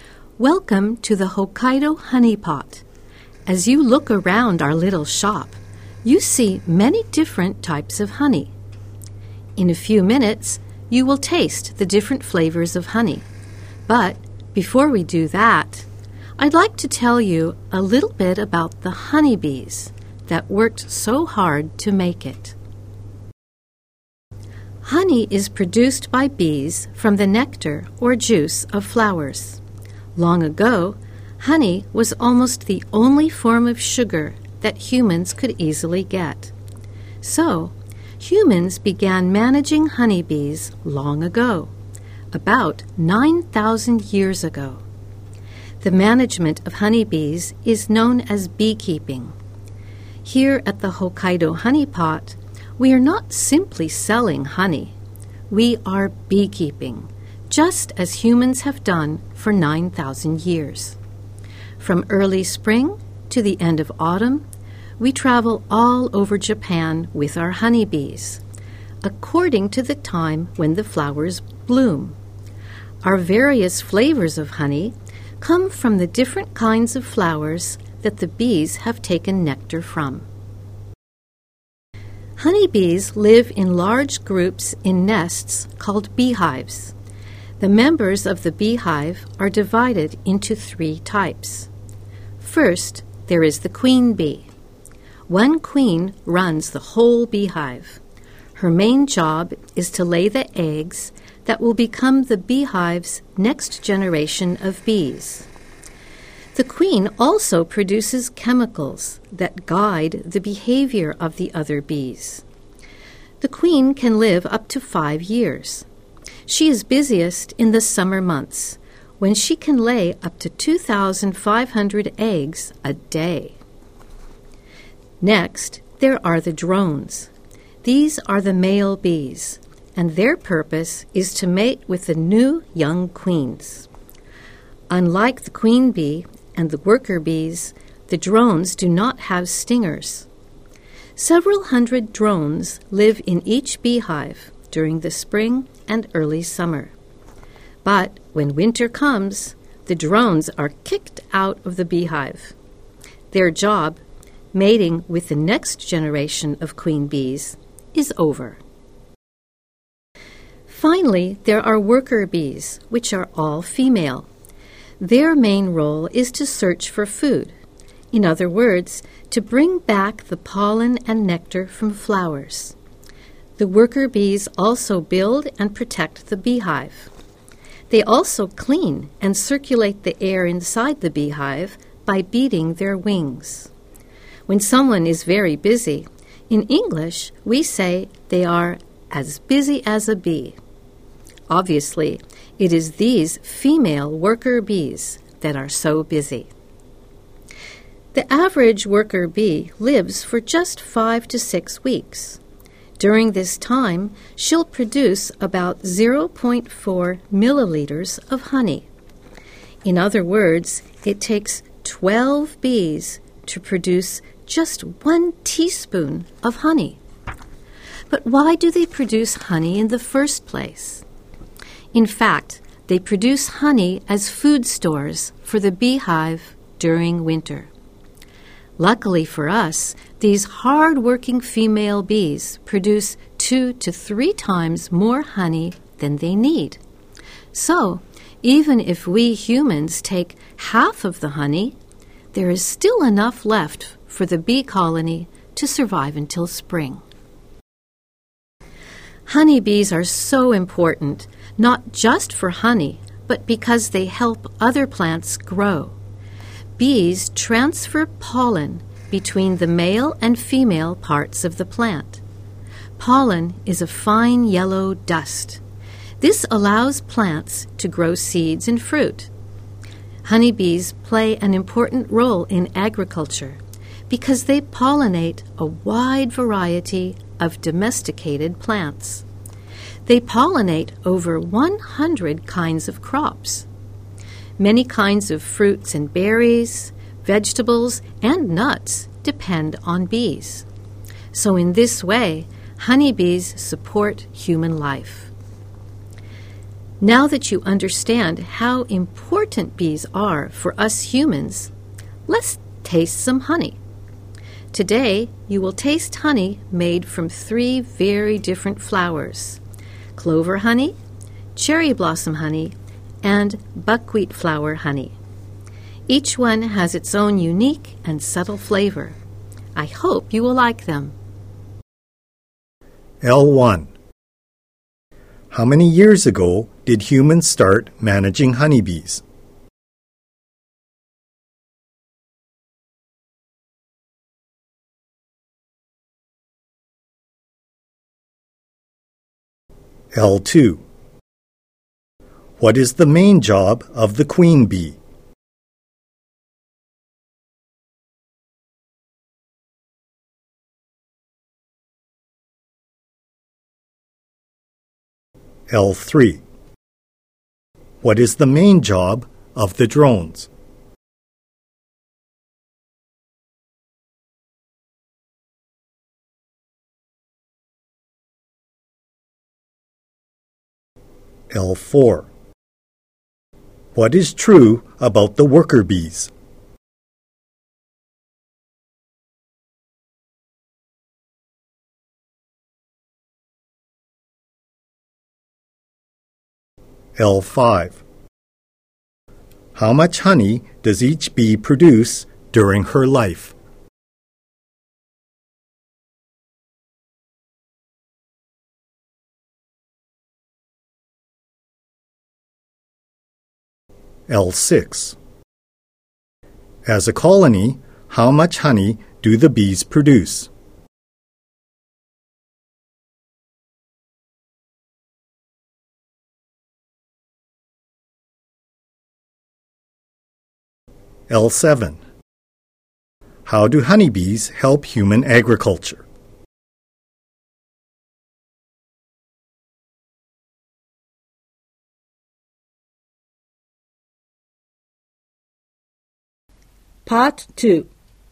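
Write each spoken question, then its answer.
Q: How many years ago did humans start managing honeybees?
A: About 9,000 years ago

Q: What is the main job of the queen bee?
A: To lay the eggs for the beehive's next generation

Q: What is the main job of the drones?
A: To mate with the new young queens

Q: How much honey does each bee produce during her life?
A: About 0.4 milliliters

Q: As a colony, how much honey do the bees produce?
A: Two to three times more than they need

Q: How do honeybees help human agriculture?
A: They pollinate over 100 kinds of crops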